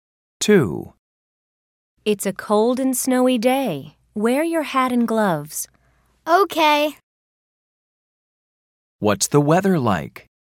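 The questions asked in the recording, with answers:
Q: What's the weather like?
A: It's cold and snowy.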